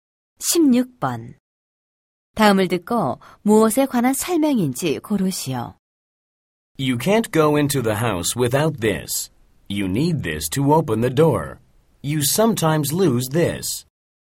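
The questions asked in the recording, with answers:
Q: 다음을 듣고 무엇에 관한 설명인지 고르시오.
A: 열쇠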